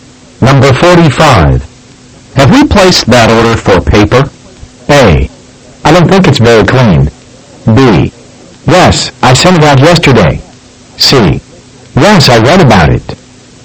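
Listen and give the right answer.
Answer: B: Yes, I sent it out yesterday.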